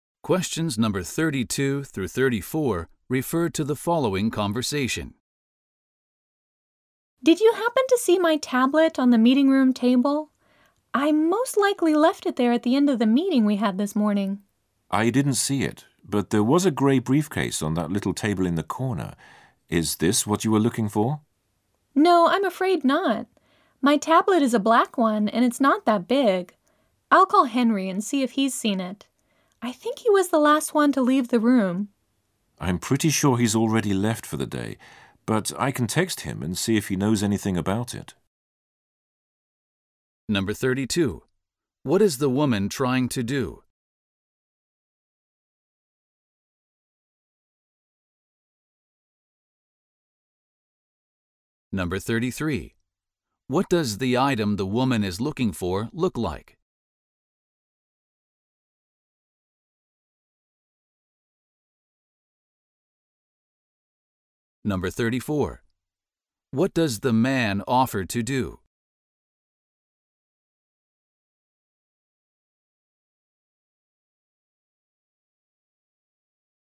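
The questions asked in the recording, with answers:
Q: What is the woman trying to do?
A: Find her tablet

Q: What does the item the woman is looking for look like?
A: It is black and not very big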